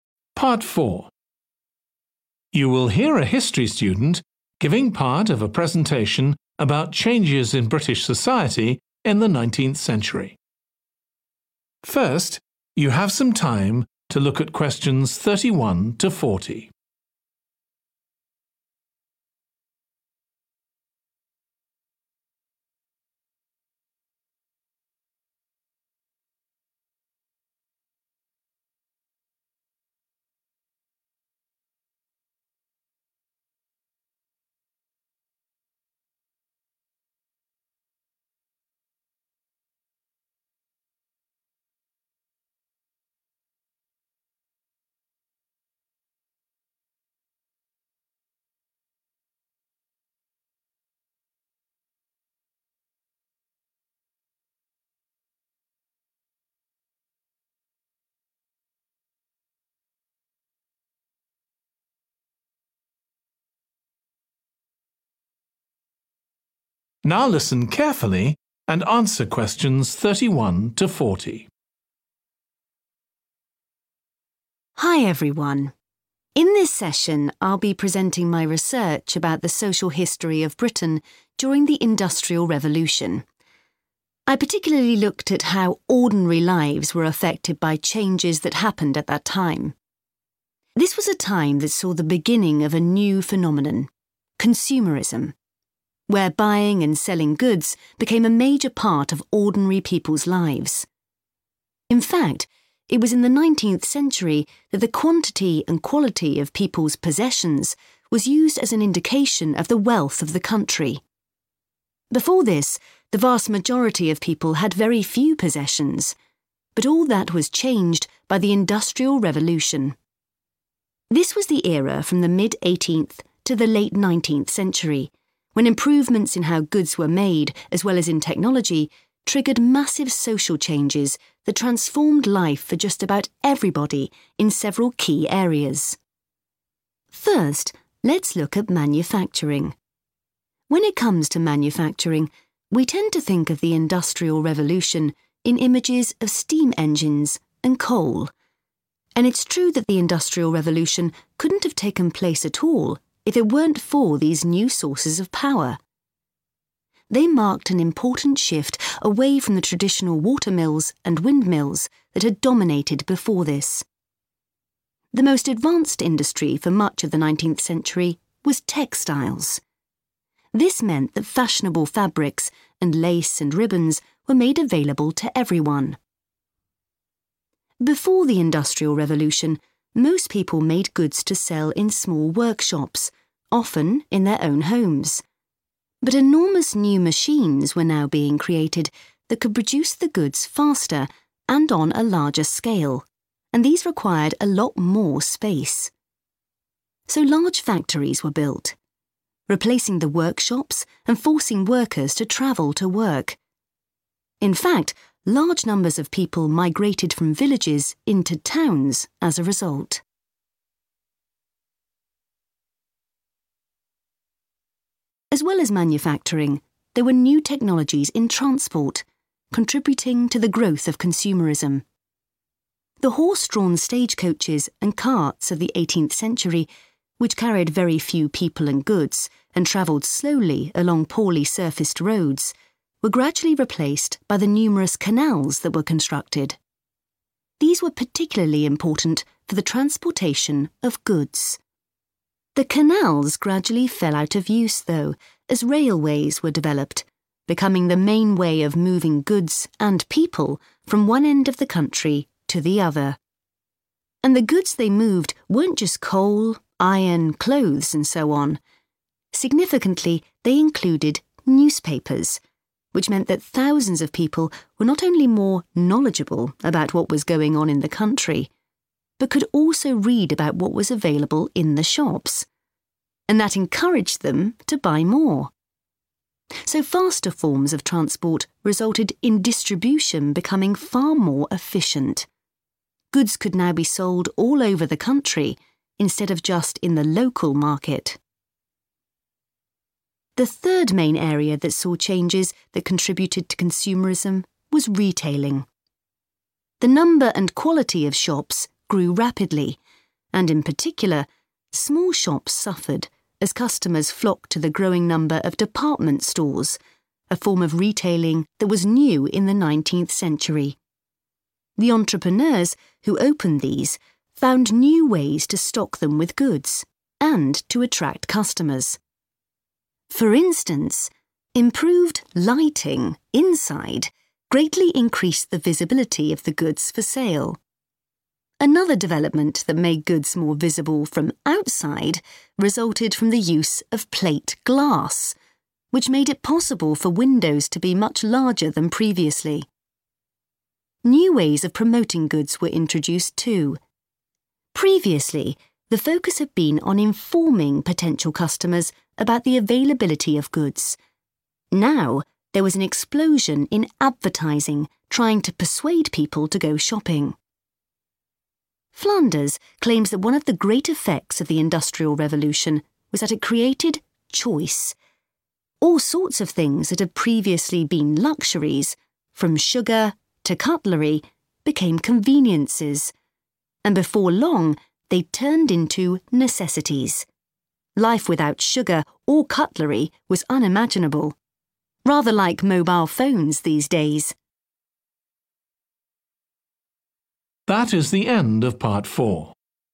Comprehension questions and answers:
Complete the notes below. Write ONE WORD ONLY for each answer.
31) For the first time, people's possessions were used to measure Britain's 31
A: wealth

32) Developments in production of goods and in _____ greatly changed lives.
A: technology

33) The Industrial Revolution would not have happened without the new types of _____ that were used then.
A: power

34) The leading industry was _____ (its products became widely available).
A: textile / textiles

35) New _____ made factories necessary and so more people moved into towns.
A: machines

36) – greater access to _____ Made people more aware of what they could buy in shops.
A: newspapers

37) – when shopping, people were not limited to buying _____ goods.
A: local

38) – inside stores because of better _____ .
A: lighting

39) – outside stores, because _____ were bigger.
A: windows

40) _____ that was persuasive became much more common.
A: Advertising

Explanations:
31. The transcript tells us that in the 19th century, the number and quality of things people owned were used to show how rich the country was. Answer Explanation: The answer refers to the possessions people had, like their belongings or things they owned that showed how much money and things they had. Reason For Correctness: The correct answer matches because the excerpt talks about how the possessions people had were used to indicate the wealth of the country. The word 'wealth' represents the value of these possessions and how rich or well-off someone or a country is.
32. The transcript talks about how advancements in how goods were made and in technology led to significant social changes. Answer Explanation: The answer 'technology' refers to the advancements and innovations in machinery and tools that played a crucial role in the Industrial Revolution. Reason For Correctness: The correct answer is 'technology' because the excerpt highlights the importance of technology in triggering social changes during the Industrial Revolution, emphasizing how improvements in technology were a key factor in transforming people's lives.
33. The transcript is saying that the Industrial Revolution couldn't have happened without new sources of power. Answer Explanation: The answer refers to the strength or energy that was essential for driving machines during the Industrial Revolution. Reason For Correctness: The correct answer matches the context of the excerpt which emphasizes the importance of new sources of power for enabling the Industrial Revolution to occur.
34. The most advanced industry for much of the 19th century was textiles. Excerpt/Transcript Explanation: The transcript mentions that textiles, which are fabric or cloth materials, were the most advanced industry in the 19th century. Answer Explanation: The answer 'textile' refers to fabrics or cloth materials that were a crucial part of the Industrial Revolution in Britain. Reason For Correctness: The correct answer is 'textile' because the excerpt clearly states that textiles were the leading industry in the 19th century. It highlights the importance of textile production during the Industrial Revolution in Britain.
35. The transcript talks about big new machines being made that could make things faster and in bigger amounts. Answer Explanation: The answer 'machines' refers to these big new creations that help in producing goods more quickly and on a larger scale. Reason For Correctness: The correct answer is supported by the fact that the machines mentioned in the excerpt were crucial for increasing production speed and capacity during the Industrial Revolution.
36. they included newspapers Excerpt/Transcript Explanation: The transcript mentions that department stores had more visible displays of goods inside and outside the stores. Answer Explanation: The answer refers to newspapers, which are a type of media that contains information and can be persuasive. Reason For Correctness: The correct answer matches the context of persuasive displays and information being more common during the Industrial Revolution. Newspapers were a form of communication that became widely available during that time period, providing information and influencing perceptions.
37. goods could now be sold all over the country, instead of just in the local market. Excerpt/Transcript Explanation: The transcript talks about how goods were now able to be sold in different places across the country, not just local areas. Answer Explanation: The answer 'local' refers to goods being sold in nearby or neighborhood areas. Reason For Correctness: The correct answer is 'local' because it fits the context of goods being sold all over the country instead of just in nearby markets. The word 'local' signifies a close geographical area, which contrasts with selling goods across the entire country.
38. improved lighting inside greatly increased the visibility of the goods for sale. Excerpt/Transcript Explanation: The transcript talks about how better lighting inside stores made it easier for customers to see the products that were for sale. Answer Explanation: The answer means that improved lighting played a significant role in helping people see the goods displayed for sale inside the stores. Reason For Correctness: The correct answer is appropriate because it matches the context provided in the excerpt, which highlights the importance of improved lighting in enhancing visibility and display of goods inside stores during the Industrial Revolution.
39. which made it possible for windows to be much larger than previously. Excerpt/Transcript Explanation: The transcript mentions that windows could be made larger than before due to something that made it possible. Answer Explanation: The answer 'windows' refers to the glass openings in buildings that allow light to come in and people to see outside. Reason For Correctness: The correct answer is 'windows' because the excerpt talks about how it became possible for windows to be larger, which would have helped display goods better inside stores and attract more customers. Larger windows could let in more light and make it easier for people passing by to see what's inside the stores.
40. now there was an explosion in advertising trying to persuade people to go shopping. Excerpt/Transcript Explanation: The transcript talks about a sudden increase in advertisements that aim to convince people to shop. Answer Explanation: The answer refers to the act of advertising, which means creating messages to persuade people to buy things. Reason For Correctness: The correct answer matches the context of the excerpt as it mentions a rise in persuasive advertising, which aligns with the idea of advertising trying to convince people to shop more during the described time period of increased industrialization.

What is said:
Hi everyone, in this session I'll be presenting my research about the social history of Britain during the Industrial Revolution. I particularly looked at how ordinary lives were affected by changes that happened at that time. This was a time that saw the beginning of a new phenomenon; consumerism – where buying and selling goods became a major part of ordinary people's lives.
In fact, it was in the 19th century that the quantity and quality of people's possessions was used as an indication of the wealth of the country. Before this, the vast majority of people had very few possessions, but all that was changed by the Industrial Revolution. This was the era from the mid-18th to the late 19th century, when improvements in how goods were made as well as in technology triggered massive social changes that transformed life for just about everybody in several key areas.
First let's look at manufacturing. When it comes to manufacturing, we tend to think of the Industrial Revolution in images of steam engines and coal. And it's true that the Industrial Revolution couldn't have taken place at all if it weren't for these new sources of power. They marked an important shift away from the traditional watermills and windmills that had dominated before this. The most advanced industry for much of the 19th century was textiles. This meant that fashionable fabrics, and lace and ribbons were made available to everyone.
Before the Industrial Revolution, most people made goods to sell in small workshops, often in their own homes. But enormous new machines were now being created that could produce the goods faster and on a larger scale, and these required a lot more space. So large factories were built, replacing the workshops, and forcing workers to travel to work. In fact, large numbers of people migrated from villages into towns as a result.
As well as manufacturing, there were new technologies in transport, contributing to the growth of consumerism. The horse-drawn stagecoaches and carts of the 18th century, which carried very few people and good, and travelled slowly along poorly surfaced roads, were gradually replaced by the numerous canals that were constructed. These were particularly important for the transportation of goods. The canals gradually fell out of use, though, as railways were developed, becoming the main way of moving goods and people from one end of the country to the other. And the goods they moved weren't just coal, iron, clothes, and so on – significantly, they included newspapers, which meant that thousands of people were not only more knowledgeable about what was going on in the country, but could also read about what was available in the shops. And that encouraged them to buy more. so faster forms of transport resulted in distribution becoming far more efficient – goods could now be sold all over the country, instead of just in the local market.
The third main area that saw changes that contributed to consumerism was retailing. The number and quality of shops grew rapidly, and in particular, small shops suffered as customers flocked to the growing number of department stores – a form of retailing that was new in the 19th century. The entrepreneurs who opened these found new ways to stock them with goods, and to attract customers: for instance, improved lighting inside greatly increased the visibility of the goods for sale. Another development that made goods more visible from outside resulted from the use of plate glass, which made it possible for windows to be much larger than previously. New ways of promoting goods were introduced, too. Previously, the focus had been on informing potential customers about the availability of goods; now there was an explosion in advertising trying to persuade people to go shopping.
Flanders claims that one of the great effects of the Industrial Revolution was that it created choice. All sorts of things that had previously been luxuries – from sugar to cutlery – became conveniences, and before long they'd turned into necessities: life without sugar or cutlery was unimaginable. Rather like mobile phones these days!